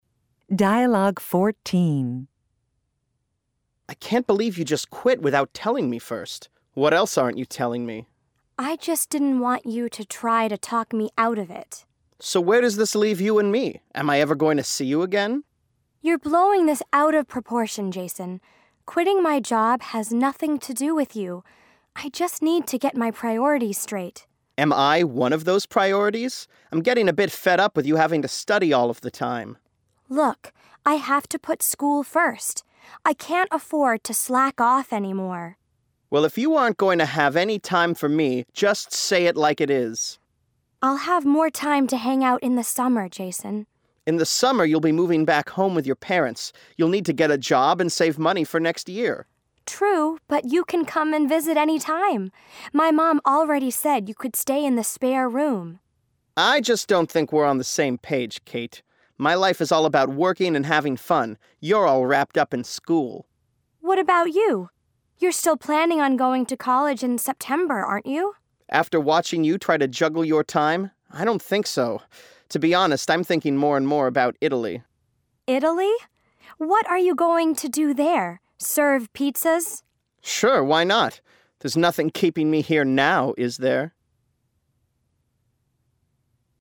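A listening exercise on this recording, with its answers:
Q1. Why is Jason angry at Kate?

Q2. What does Kate say she has to put first?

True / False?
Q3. True or False? Kate says she will not have time to hang out with Jason in the summer.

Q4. What does Jason think Kate will be doing all summer?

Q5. Why does Jason say he might not go to college?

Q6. Where might Jason go instead of college?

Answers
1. She quit her job without telling him first.
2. School
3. False
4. Living with her parents, working and saving money for next year.
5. After watching Kate try to juggle her time, he doesn't want to.
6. Italy

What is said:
Jason: I can't believe you just quit without telling me first. What else aren't you telling me?
Kate: I just didn't want you to try to talk me out of it.
Jason: So where does this leave you and me? Am I ever going to see you again?
Kate: You're blowing this out of proportion, Jason. 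Quitting my job has nothing to do with you. I just need to get my priorities straight.
Jason: Am I one of those priorities? I'm getting a bit fed up with you having to study all of the time.
Kate: Look, I have to put school first. I can't afford to slack off anymore.
Jason: Well, if you aren't going to have any time for me, just say it like it is.
Kate: I'll have more time to hang out in the summer, Jason.
Jason: In the summer you'll be moving back home with your parents. You'll need to get a job and save money for next year.
Kate: True, but you can come and visit anytime. My mom already said you could stay in the spare room.
Jason: I just don't think we're on the same page, Kate. My life is all about working and having fun. You're all wrapped up in school.
Kate: What about you? You're still planning on going to college in September, aren't you?
Jason: After watching you try to juggle your time, I don't think so. 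To be honest, I'm thinking more and more about Italy.
Kate: Italy? What are you going to do there? Serve pizzas?
Jason: Sure, why not? There's nothing keeping me here now, is there?

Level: Intermediate (B1)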